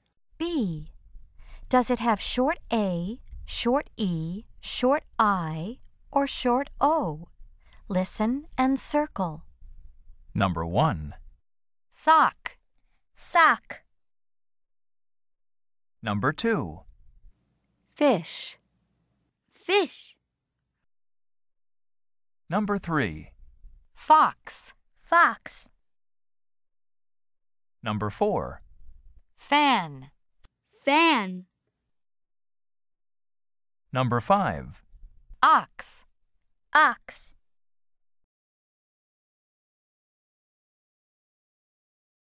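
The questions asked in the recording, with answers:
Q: Does it have short A, short E, short I, or short O?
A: short O (sock)

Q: Does it have short A, short E, short I, or short O?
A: short I (fish)

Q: Does it have short A, short E, short I, or short O?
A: short O (fox)

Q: Does it have short A, short E, short I, or short O?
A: short A (fan)

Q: Does it have short A, short E, short I, or short O?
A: short O (ox)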